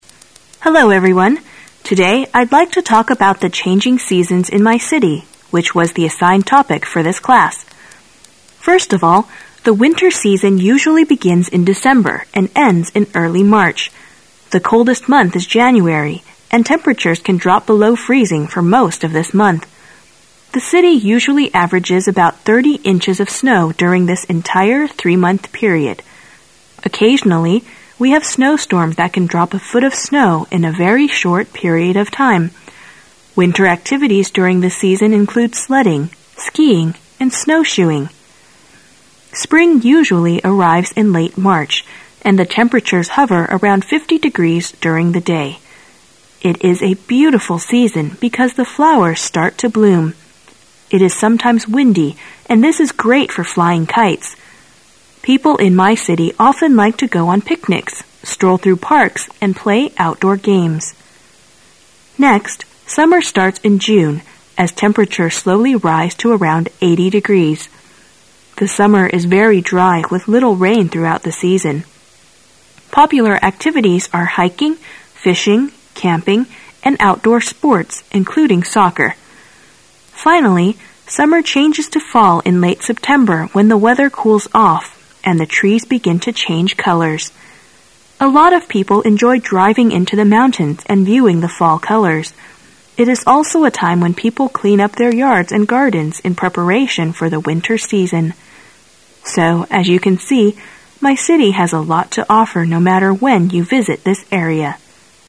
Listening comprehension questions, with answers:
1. Which type of recording is the talk most probably?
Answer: An academic presentation at school.

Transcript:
Today, I'd like to talk about the changing seasons in my city which was the assigned topic for this class. First of all, the winter season usually begins in December and ends in early March. The coldest month is January, and temperatures can drop below freezing for most of this month. The city usually averages about 30 inches of snow during this entire, 3-month period. Occasionally, we have snow storms that can drop a foot of snow in a very short period of time. Winter activities during this season include sledding, skiing, and snowshoeing. Spring usually arrives in late March, and the temperatures hover around 50 degrees during the day. It is a beautiful season because the flowers start to bloom. It is sometimes, windy, and this is great for flying,kites. People in my city often like to go on picnics, stroll through parks, and play outdoor games. Next, summer starts in June, as temperatures slowly rise to around 80 degrees. The summer is very dry with little rain throughout the season. Popular activities are hiking, fishing, camping, and outdoor sports including soccer. Finally, summer changes to fall in late September when the weather cools off, and the trees begin to change colors. A lot of people enjoy driving into the mountains and viewing the fall colors. It is also a time when people clean up their yards and gardens in preparation for the winter season. So, as you can see, my city has a lot to offer no matter when you visit this area.